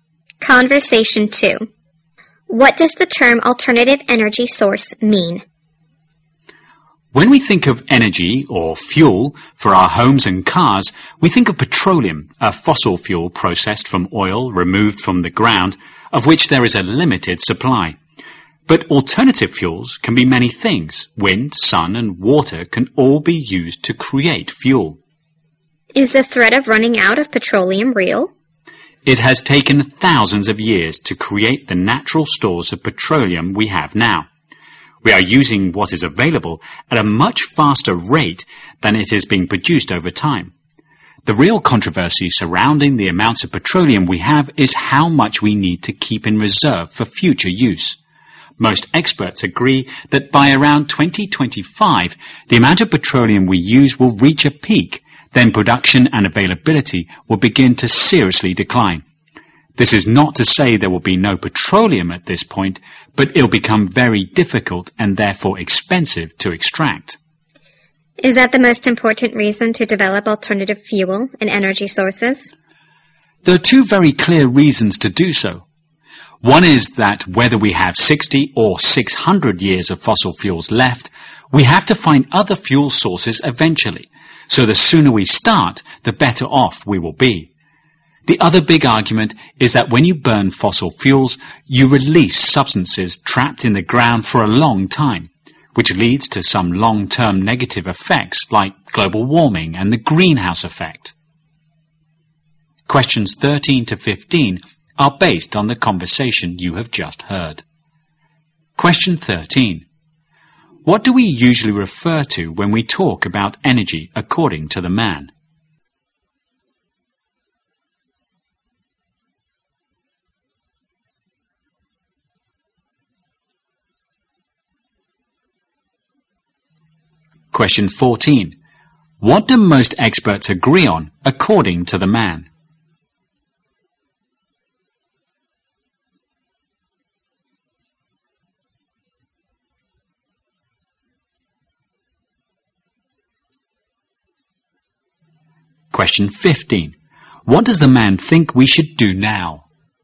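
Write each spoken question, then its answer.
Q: What do we usually refer to when we talk about energy according to the man?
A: Petroleum, a fossil fuel

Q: What do most experts agree on according to the man?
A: Petroleum use will peak around 2025 and then production will decline

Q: What does the man think we should do now?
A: Start developing alternative fuel sources as soon as possible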